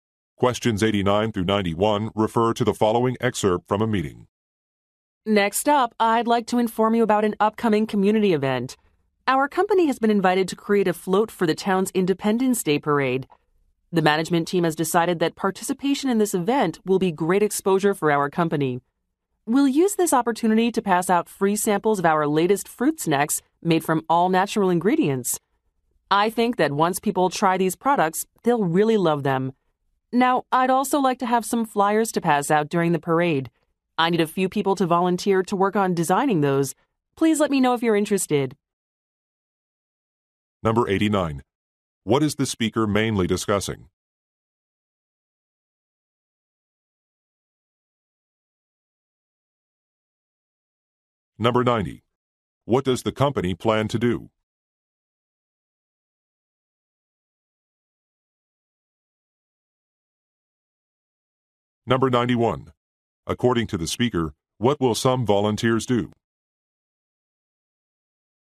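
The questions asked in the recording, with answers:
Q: What is the speaker mainly discussing?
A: An upcoming community event (a parade)

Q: What does the company plan to do?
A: Give out free samples of its fruit snacks

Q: According to the speaker, what will some volunteers do?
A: Design flyers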